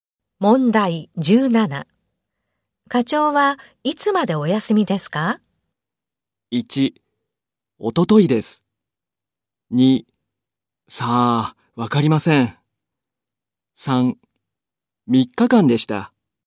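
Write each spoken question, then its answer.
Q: 課長はいつまでお休みですか?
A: 2: さあ、わかりません。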